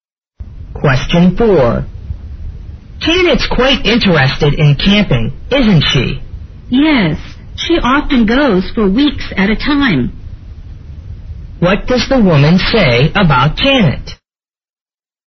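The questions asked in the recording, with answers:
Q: What does the woman say about Janet?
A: Janet often goes camping for weeks at a time.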